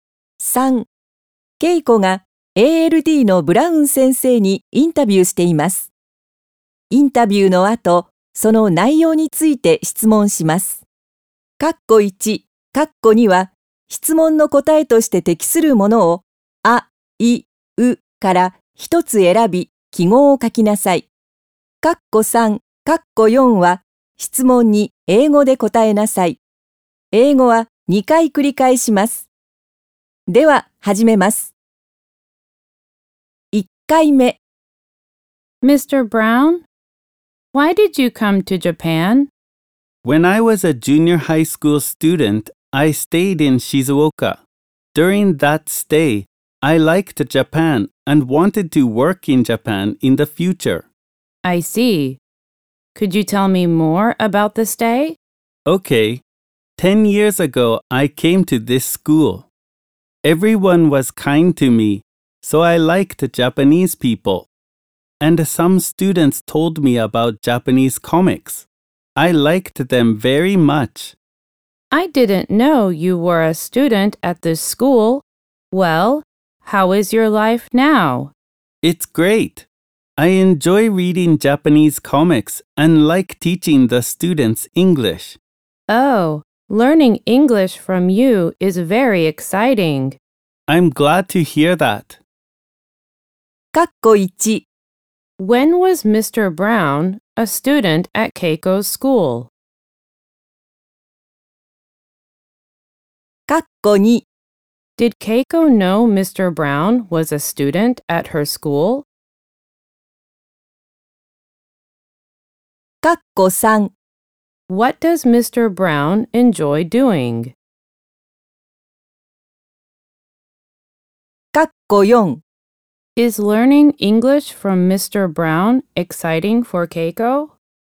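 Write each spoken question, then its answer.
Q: When was Mr. Brown a student at Keiko's school?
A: 10 years ago, when he was a junior high school student

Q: Did Keiko know Mr. Brown was a student at her school?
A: No, she didn't.

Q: What does Mr. Brown enjoy doing?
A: He enjoys reading Japanese comics.

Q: Is learning English from Mr. Brown exciting for Keiko?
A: Yes, it is.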